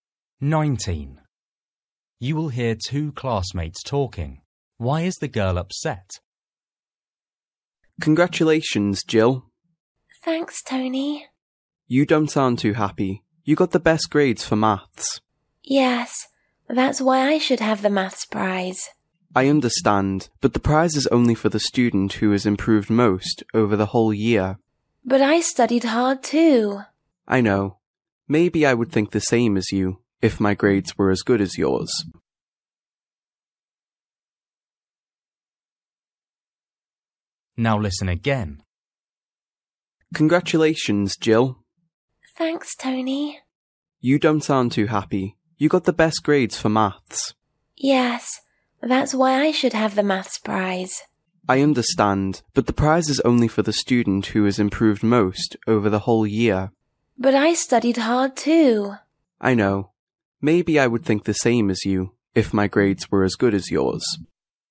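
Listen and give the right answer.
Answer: She didn't get the maths prize although she had the best grades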